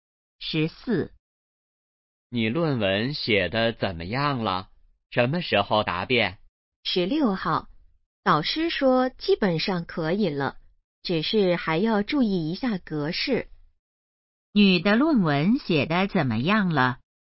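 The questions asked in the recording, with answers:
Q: 女的论文写得怎么样了?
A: 基本上可以了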